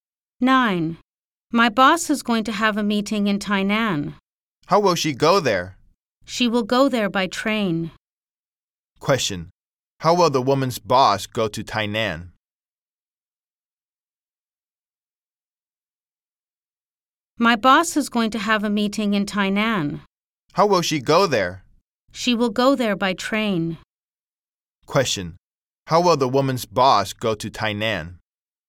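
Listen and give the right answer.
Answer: By train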